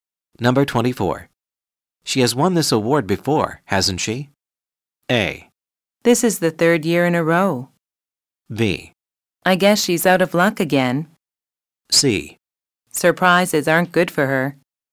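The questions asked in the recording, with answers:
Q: She has won this award before, hasn't she?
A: A: This is the third year in a row.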